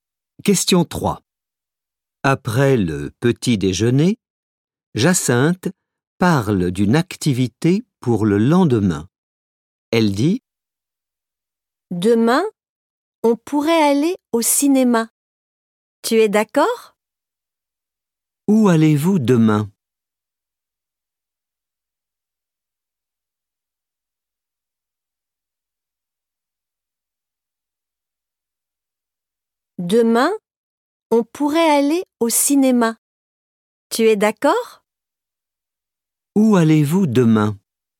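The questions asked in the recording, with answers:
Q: Où allez-vous demain ?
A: au cinéma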